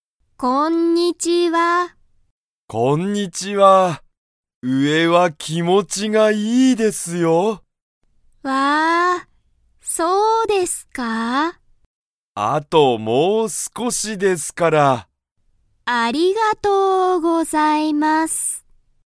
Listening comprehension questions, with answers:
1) その人(ひと)は、上(うえ)は____と言(い)った。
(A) おいしい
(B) 広(ひろ)い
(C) 高(たか)い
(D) 気持(きも)ちいい)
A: 気持(きも)ちいい)

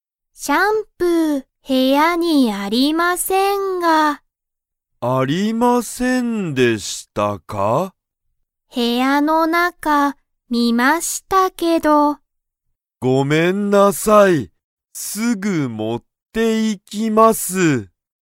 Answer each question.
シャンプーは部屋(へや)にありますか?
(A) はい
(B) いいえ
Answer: いいえ

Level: Level 1

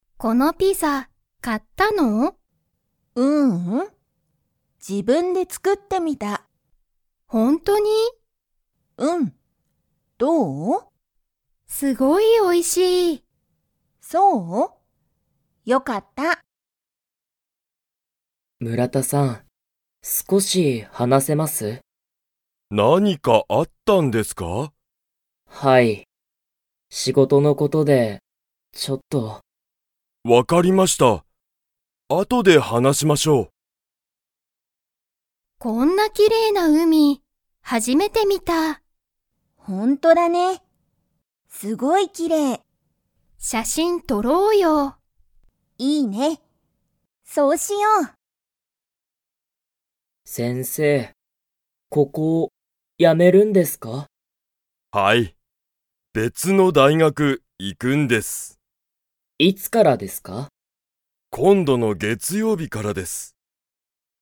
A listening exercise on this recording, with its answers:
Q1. カオリは、このピザを買(か)いましたか?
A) はい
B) いいえ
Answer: いいえ

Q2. 中井(なかい)さんは、____のことを話(はな)したい。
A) 後(あと)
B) 村田(むらた)さん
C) 学校(がっこう)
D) 仕事(しごと)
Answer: 仕事(しごと)

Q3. マドカは、____を初(はじ)めて見(み)た。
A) 初(はじ)めての写真(しゃしん)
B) この前撮(まえと)った写真(しゃしん)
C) こんなきれいな海(うみ)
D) 前(まえ)に来(き)た海(うみ)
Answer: こんなきれいな海(うみ)

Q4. 先生(せんせい)は、ここを辞(や)めますか?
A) はい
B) いいえ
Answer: はい

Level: Level 1

